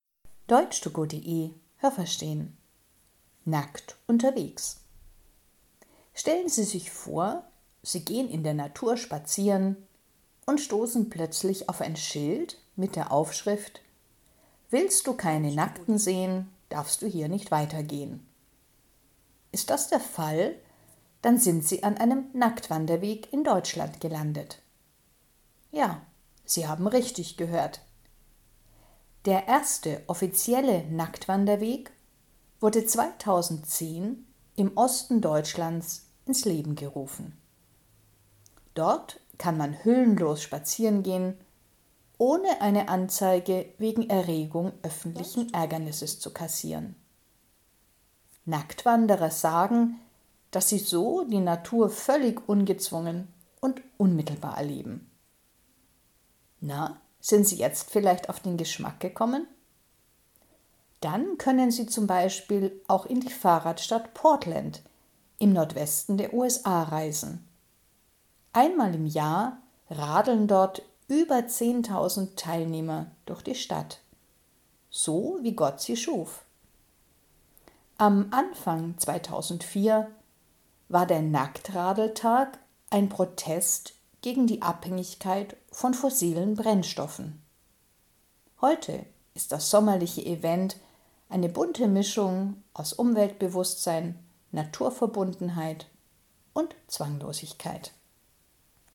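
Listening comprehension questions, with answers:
Haben Sie das gehört? Stimmt diese Aussage?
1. „Willst du keine Nackten sehen, darfst du hier nicht weitergehen" – das ist ein altes Sprichwort in Deutschland.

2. Es gibt in Deutschland Wanderwege in der Natur, auf denen man nackt spazieren gehen kann.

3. Den ersten Wanderweg in Deutschland, auf dem man nackt wandern konnte, gab es 2010 in Ostdeutschland.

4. Auf den Nacktwanderwegen muss man am Eingang für die Öffentlichkeit Geld bezahlen.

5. Nacktwanderer schätzen den direkten Kontakt zur Natur.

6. In Portland (USA) fahren das ganze Jahr über Menschen nackt durch die Stadt.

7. Der erste Nacktradeltag 2004 in Portland war ein Protest gegen die Abhängigkeit von Brennstoffen wie Kohle und Erdöl.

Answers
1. Falsch
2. Richtig
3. Richtig
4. Falsch
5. Richtig
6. Falsch
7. Richtig

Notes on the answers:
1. Das ist kein Sprichwort, sondern der Spruch steht auf einem Schild, das man in der Natur an speziellen Plätzen finden kann.
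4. Das Verb „kassieren" hat hier nichts mit Geld zu tun. Man kassiert (= bekommt) keine polizeiliche Anzeige, wenn man auf den Nacktwanderwegen keine Kleidung trägt.
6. Das ist nur an einem Tag im Jahr der Fall.

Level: Hörtexte B (mittel)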